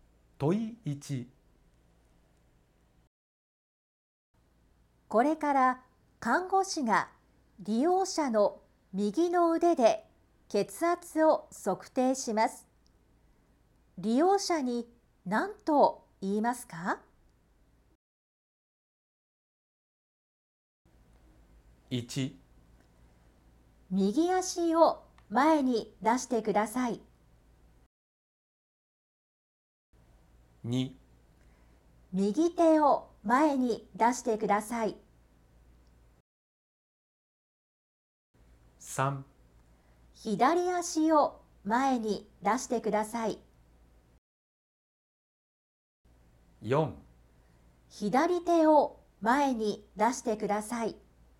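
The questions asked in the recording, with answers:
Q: これから看護師が利用者の右の腕で血圧を測定します。利用者に何と言いますか?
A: 2: 右手を前に出してください。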